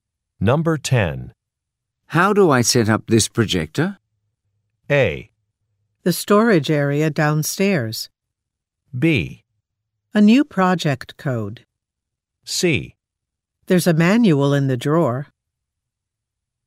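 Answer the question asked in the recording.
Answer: C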